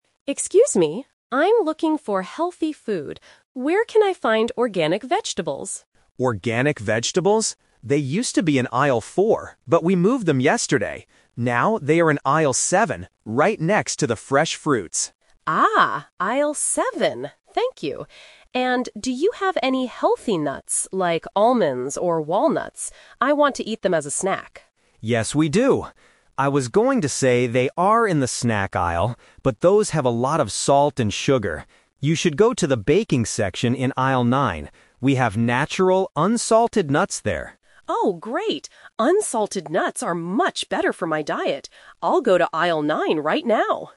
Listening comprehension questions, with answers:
Listen to the conversation between a customer and a supermarket staff member. Choose the correct answer (A, B, or C) for each question.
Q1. Where are the organic vegetables now?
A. In Aisle 4.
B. In Aisle 7.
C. In Aisle 9.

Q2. Why doesn't the staff recommend the nuts in the snack aisle?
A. Because they are too expensive.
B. Because they are completely sold out.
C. Because they have a lot of salt and sugar.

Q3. What is the customer going to do right now?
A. Buy some fresh fruits.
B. Go to the baking section.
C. Look for salted almonds.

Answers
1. B. In Aisle 7.
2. C. Because they have a lot of salt and sugar.
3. B. Go to the baking section.

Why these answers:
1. The staff clearly says, "Now they are in Aisle 7". Option (A) is a trap; the vegetables used to be in Aisle 4, but they were moved. Option (C) is also a trap; Aisle 9 is where the nuts are located, not the vegetables.
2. The staff explains that the nuts in the snack aisle "have a lot of salt and sugar", so he suggests a healthier option. Options (A) and (B) are plausible reasons for not buying something in a supermarket, but they are not mentioned in the audio.
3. The customer says, "I'll go to Aisle 9 right now." Earlier, the staff mentioned that Aisle 9 is the baking section. Option (A) is a trap; fresh fruits are mentioned as being next to the vegetables, but she doesn't say she will buy them. Option (C) is a trap because the customer specifically wants unsalted nuts for her diet, not salted ones.

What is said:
Customer: Excuse me. I'm looking for healthy food. Where can I find organic vegetables?
Staff: Organic vegetables? They used to be in Aisle 4, but we moved them yesterday. Now they are in Aisle 7, right next to the fresh fruits.
Customer: Ah, Aisle 7. Thank you! And do you have any healthy nuts, like almonds or walnuts? I want to eat them as a snack.
Staff: Yes, we do. I was going to say they are in the snack aisle, but those have a lot of salt and sugar. You should go to the baking section in Aisle 9. We have natural, unsalted nuts there.
Customer: Oh, great! Unsalted nuts are much better for my diet. I'll go to Aisle 9 right now.

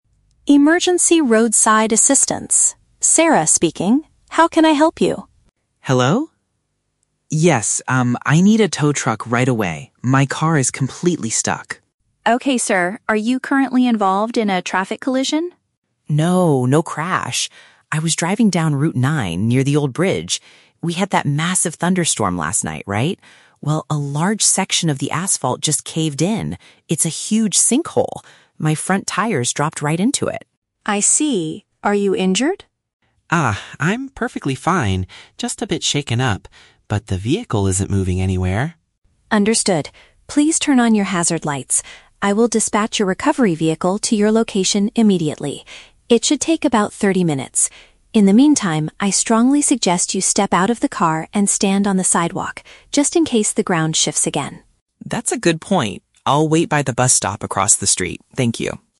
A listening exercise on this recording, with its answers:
Listen to a telephone conversation between a driver and an emergency dispatcher, and choose the correct answer (A, B, or C) for each question.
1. What caused the man's car to get stuck?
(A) He was involved in a serious accident with another vehicle.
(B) A part of the street collapsed following severe weather.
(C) A large tree fell across the road and blocked his path.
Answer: (B) A part of the street collapsed following severe weather.

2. How is the driver feeling right now?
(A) He is physically unharmed but feels slightly frightened.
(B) He is suffering from some minor physical injuries.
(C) He is incredibly angry about the thirty-minute wait.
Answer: (A) He is physically unharmed but feels slightly frightened.

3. What does the dispatcher advise the man to do while waiting?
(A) Remain safely inside his car with the lights flashing.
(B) Walk towards the old bridge to meet the rescue team.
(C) Exit his automobile and wait on the pedestrian path.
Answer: (C) Exit his automobile and wait on the pedestrian path.

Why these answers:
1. The driver explains that after a "massive thunderstorm" (severe weather), "a large section of the asphalt just caved in" (a part of the street collapsed).
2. The man says, "I'm perfectly fine, just a bit shaken up." "Physically unharmed" means perfectly fine, and "slightly frightened" is a paraphrase of a bit shaken up.
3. The dispatcher strongly suggests that he "step out of the car and stand on the sidewalk." "Exit his automobile" means step out of the car, and "pedestrian path" is a synonym for the sidewalk.

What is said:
Dispatcher: Emergency Roadside Assistance. Sarah speaking. How can I help you?
Driver: Hello? Yes, um, I need a tow truck right away. My car is completely stuck.
Dispatcher: Okay, sir. Are you currently involved in a traffic collision?
Driver: No, no crash. I was driving down Route 9, near the old bridge. We had that massive thunderstorm last night, right? Well, a large section of the asphalt just caved in. It's a huge sinkhole! My front tires dropped right into it.
Dispatcher: I see. Are you injured?
Driver: Ah, I'm perfectly fine, just a bit shaken up. But the vehicle isn't moving anywhere.
Dispatcher: Understood. Please turn on your hazard lights. I will dispatch a recovery vehicle to your location immediately. It should take about thirty minutes. In the meantime, I strongly suggest you step out of the car and stand on the sidewalk, just in case the ground shifts again.

